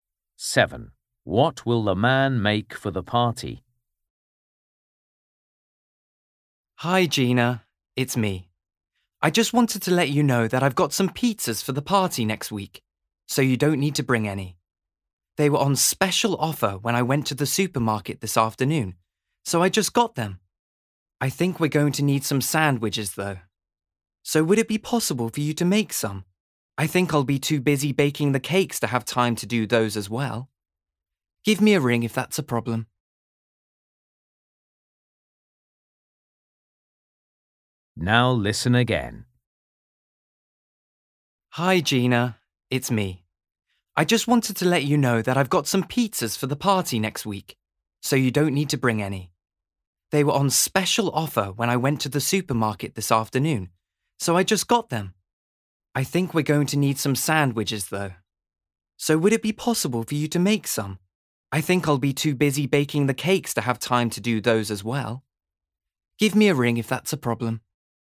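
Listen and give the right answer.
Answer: cakes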